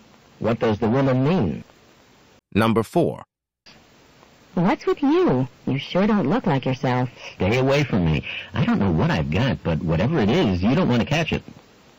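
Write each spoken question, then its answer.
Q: What can be inferred about the man?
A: He is sick.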